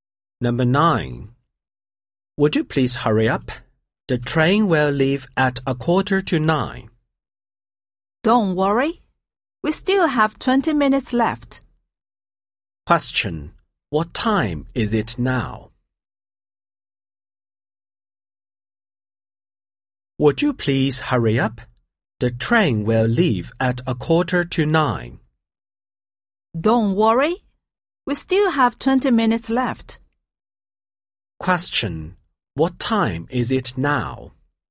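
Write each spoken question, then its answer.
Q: What time is it now?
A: 8:25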